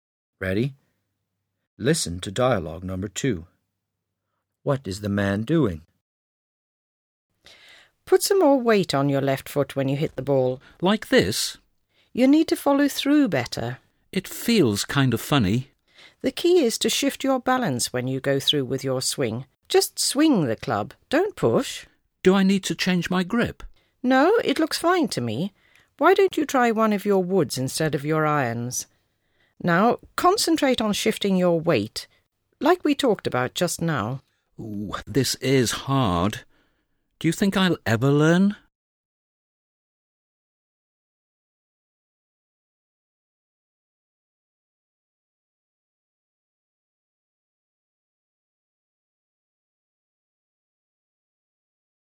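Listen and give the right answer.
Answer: Taking a golf lesson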